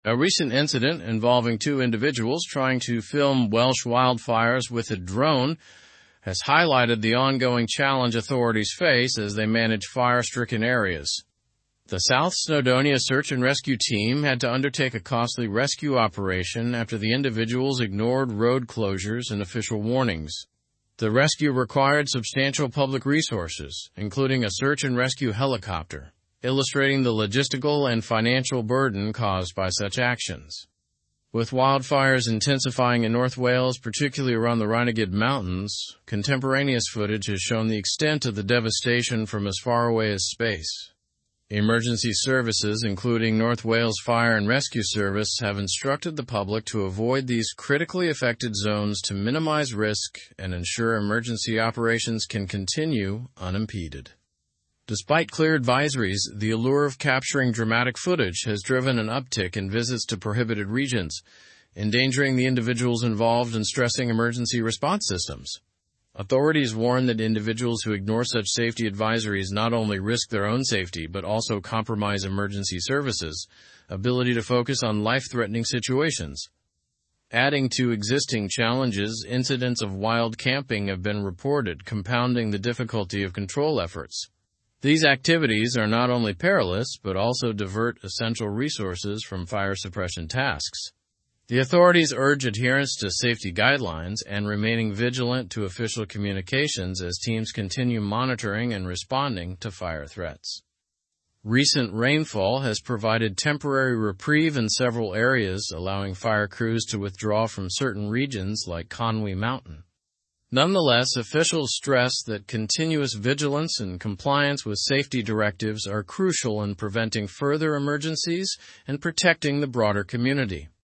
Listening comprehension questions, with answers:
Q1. What did the South Snowdonia Search and Rescue Team do in response to the incident?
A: They undertook a costly rescue operation.

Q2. What areas were emergency services advising people to avoid?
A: Critically affected zones.

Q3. What impact has the allure of capturing footage had on these regions?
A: It has driven an uptick in visits to prohibited regions.

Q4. What activities have compounded the difficulty of control efforts?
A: Incidents of wild camping.

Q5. What temporary change happened due to recent rainfall?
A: It provided a temporary reprieve, allowing some fire crews to withdraw.

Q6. Why is continuous vigilance and compliance important according to the article?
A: To prevent further emergencies and protect the broader community.

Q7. What was demonstrated by the use of public resources in the rescue operation?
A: The logistical and financial burden of such rescue operations.

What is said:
A recent incident involving two individuals trying to film Welsh wildfires with a drone has highlighted the ongoing challenge authorities face as they manage fire-stricken areas. The South Snowdonia Search and Rescue Team had to undertake a costly rescue operation after the individuals ignored road closures and official warnings. The rescue required substantial public resources, including a search-and-rescue helicopter, illustrating the logistical and financial burden caused by such actions.
With wildfires intensifying in north Wales, particularly around the Rhinogydd mountains, contemporaneous footage has shown the extent of the devastation from as far away as space. Emergency services, including North Wales Fire and Rescue Service, have instructed the public to avoid these critically affected zones to minimize risk and ensure emergency operations can continue unimpeded.
Despite clear advisories, the allure of capturing dramatic footage has driven an uptick in visits to prohibited regions, endangering the individuals involved and stressing emergency response systems. Authorities warn that individuals who ignore such safety advisories not only risk their own safety but also compromise emergency services' ability to focus on life-threatening situations.
Adding to existing challenges, incidents of wild camping have been reported, compounding the difficulty of control efforts. These activities are not only perilous but also divert essential resources from fire suppression tasks. The authorities urge adherence to safety guidelines and remaining vigilant to official communications as teams continue monitoring and responding to fire threats.
Recent rainfall has provided temporary reprieve in several areas, allowing fire crews to withdraw from certain regions like Conwy Mountain. Nonetheless, officials stress that continuous vigilance and compliance with safety directives are crucial in preventing further emergencies and protecting the broader community.

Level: Level 4